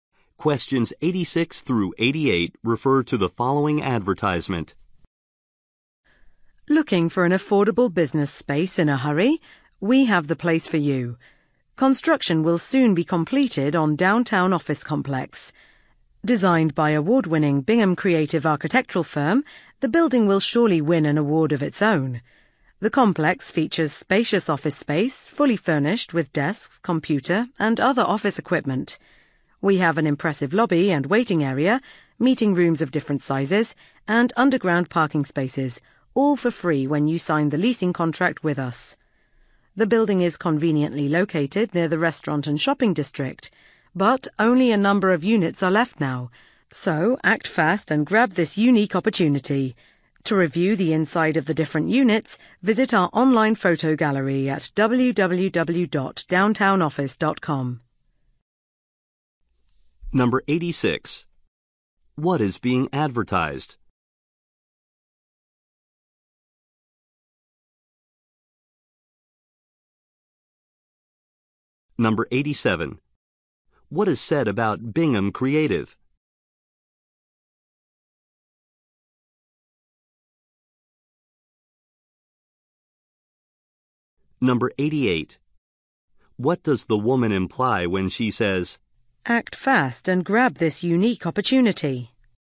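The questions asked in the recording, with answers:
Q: What is being advertised?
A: Office space in a downtown office complex

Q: What is said about Bingham Creative?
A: It is an award-winning architectural firm that designed the building

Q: What does the woman imply when she says,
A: Only a few units are left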